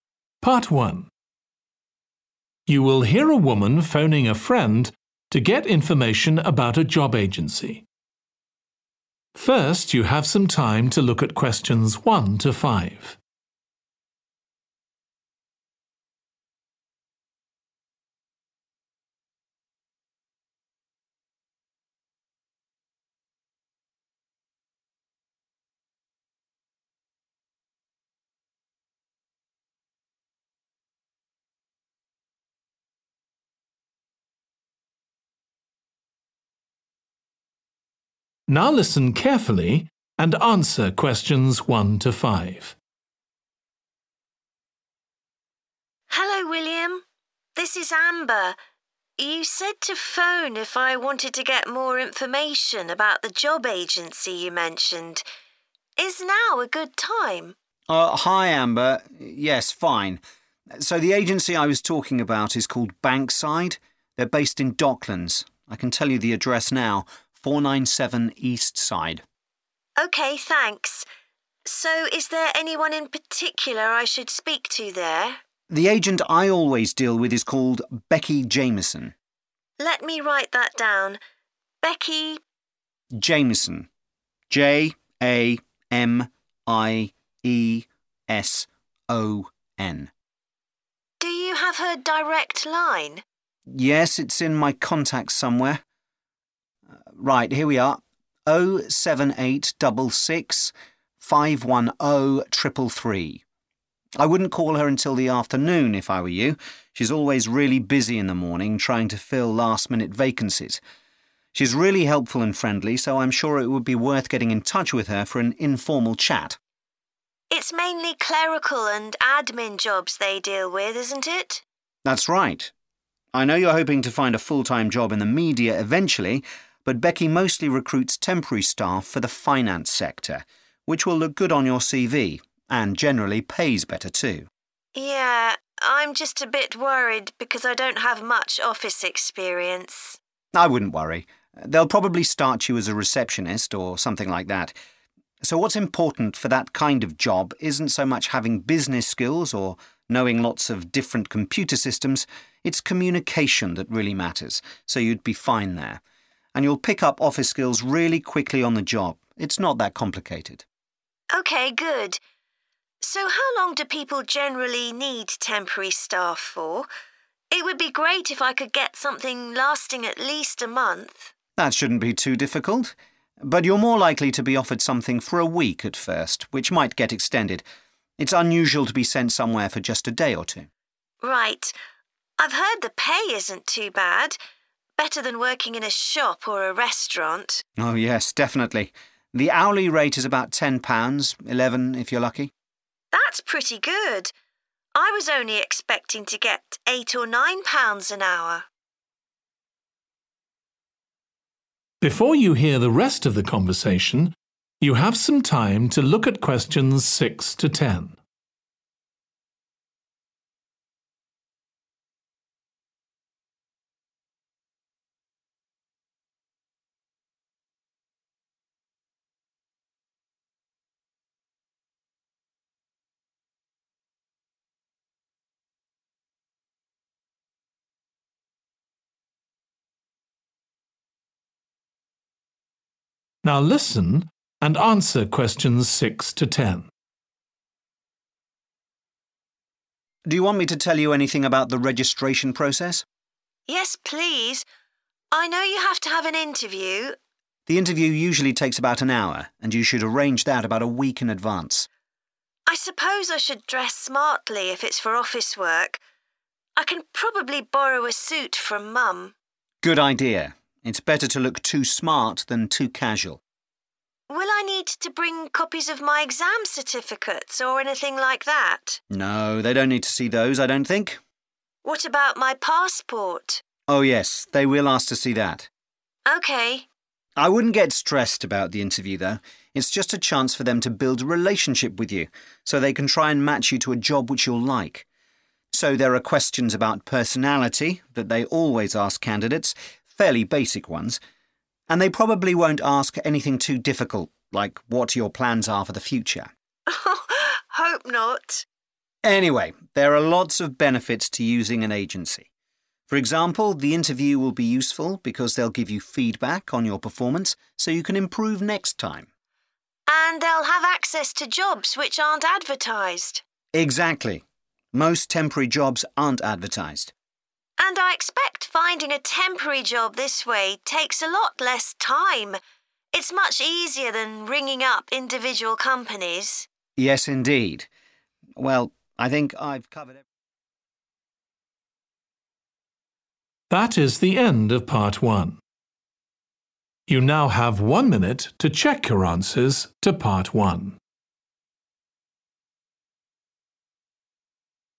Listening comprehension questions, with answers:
Complete the notes below. Write ONE WORD AND/OR A NUMBER for each answer.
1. Name of agent: Becky _____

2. Best to call her in the _____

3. Must have good _____ skills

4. Jobs are usually for at least one _____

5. Pay is usually £ _____ per hour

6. Wear a _____ to the interview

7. Must bring your _____ to the interview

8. They will ask questions about each applicant's _____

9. The _____ you receive at interview will benefit you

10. Less _____ is involved in applying for jobs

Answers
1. Jamieson
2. afternoon
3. communication
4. week
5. 10 / ten
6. suit
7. passport
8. personality
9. feedback
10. time

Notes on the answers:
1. The transcript spells out the name 'Jamieson' letter by letter to ensure the correct spelling is understood.
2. The transcript suggests that the best time to call the agent, Becky, at Bankside Recruitment Agency is in the afternoon because she is usually busy in the morning with urgent job placements.
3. The transcript suggests that effective communication is very important in this context.
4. The transcript suggests that initially, job offers from the agency are typically for a period of one week, with the possibility of extension.
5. The transcript indicates that the typical pay rate for a job is around £10 per hour, and sometimes it can be £11 per hour if you are fortunate.
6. The transcript suggests that the person is considering borrowing a suit from their mum for an upcoming event or occasion.
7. The transcript shows a person asking a question about their passport.
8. The transcript mentions that during the interview process at the agency, candidates will be asked some basic questions related to their personality.
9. The transcript indicates that during the interview, the recruitment agency will provide feedback on how the applicant performed so they can do better in the future.
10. The transcript suggests that finding a job through the agency takes less time compared to other methods.

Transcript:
AMBER: Hello William. This is Amber – you said to phone if I wanted to get more information about the job agency you mentioned. Is now a good time?
WILLIAM: Oh, hi Amber. Yes. Fine. So the agency I was talking about is called Bankside – they're based in Docklands – I can tell you the address now – 497 Eastside.
AMBER: OK, thanks. So is there anyone in particular I should speak to there?
WILLIAM: The agent I always deal with is called Becky Jamieson.
AMBER: Let me write that down – Becky ...
WILLIAM: Jamieson J-A-M-I-E-S-O-N.
AMBER: Do you have her direct line?
WILLIAM: Yes, it's in my contacts somewhere – right, here we are: 078 double 6, 510 triple 3. I wouldn't call her until the afternoon if I were you – she's always really busy in the morning trying to fill last-minute vacancies. She's really helpful and friendly so I'm sure it would be worth getting in touch with her for an informal chat.
AMBER: It's mainly clerical and admin jobs they deal with, isn't it?
WILLIAM: That's right. I know you're hoping to find a full-time job in the media eventually – but Becky mostly recruits temporary staff for the finance sector – which will look good on your CV – and generally pays better too.
AMBER: Yeah – I'm just a bit worried because I don't have much office experience.
WILLIAM: I wouldn't worry. They'll probably start you as a receptionist, or something like that. So what's important for that kind of job isn't so much having business skills or knowing lots of different computer systems – it's communication that really matters – so you'd be fine there. And you'll pick up office skills really quickly on the job. It's not that complicated.
AMBER: OK good. So how long do people generally need temporary staff for? It would be great if I could get something lasting at least a month.
WILLIAM: That shouldn't be too difficult. But you're more likely to be offered something for a week at first, which might get extended. It's unusual to be sent somewhere for just a day or two.
AMBER: Right, I've heard the pay isn't too bad – better than working in a shop or a restaurant.
WILLIAM: Oh yes – definitely. The hourly rate is about £10, 11 if you're lucky.
AMBER: That's pretty good. I was only expecting to get eight or nine pounds an hour.
WILLIAM: Do you want me to tell you anything about the registration process?
AMBER: Yes, please. I know you have to have an interview.
WILLIAM: The interview usually takes about an hour and you should arrange that about a week in advance.
AMBER: I suppose I should dress smartly if it's for office work – I can probably borrow a suit from Mum.
WILLIAM: Good idea. It's better to look too smart than too casual.
AMBER: Will I need to bring copies of my exam certificates or anything like that?
WILLIAM: No – they don't need to see those, I don't think.
AMBER: What about my passport?
WILLIAM: Oh yes – they will ask to see that.
AMBER: OK.
WILLIAM: I wouldn't get stressed about the interview though. It's just a chance for them to build a relationship with you – so they can try and match you to a job which you'll like. So there are questions about personality that they always ask candidates – fairly basic ones. And they probably won't ask anything too difficult like what your plans are for the future.
AMBER: Hope not.
WILLIAM: Anyway, there are lots of benefits to using an agency – for example, the interview will be useful because they'll give you feedback on your performance so you can improve next time.
AMBER: And they'll have access to jobs which aren't advertised.
WILLIAM: Exactly – most temporary jobs aren't advertised.
AMBER: And I expect finding a temporary job this way takes a lot less time – it's much easier than ringing up individual companies.
WILLIAM: Yes indeed. Well I think ...